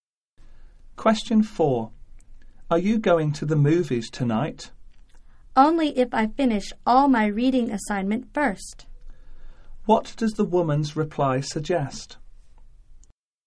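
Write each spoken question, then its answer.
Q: What does the woman's reply suggest?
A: She will go to the movies only if she finishes her reading assignment first.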